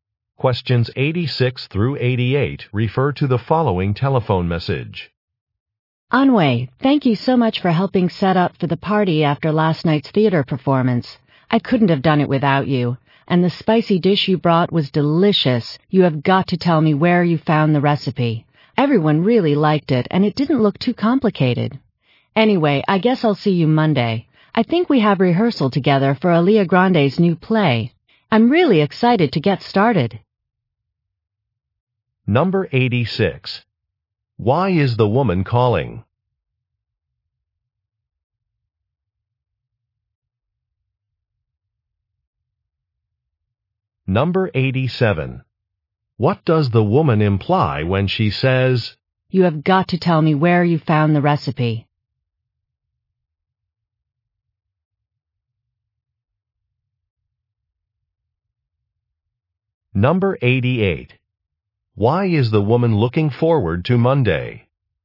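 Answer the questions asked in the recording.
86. To thank Anhui for helping set up the party
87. She wants to make the dish herself
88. Rehearsals for a new play begin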